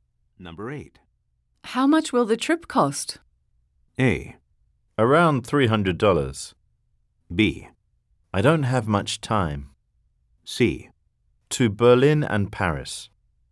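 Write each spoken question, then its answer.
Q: How much will the trip cost?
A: A: Around $300.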